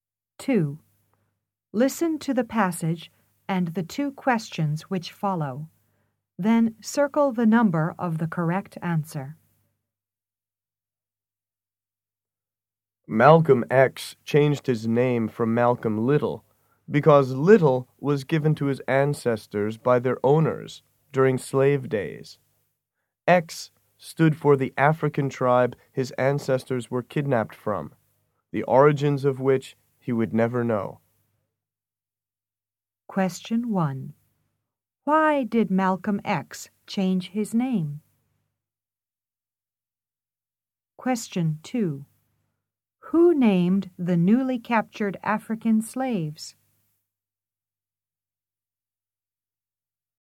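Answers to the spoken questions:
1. Because the name Little was given to his ancestors by their slave owners.
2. Their owners.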